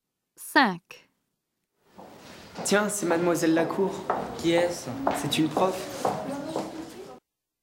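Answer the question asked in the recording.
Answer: une prof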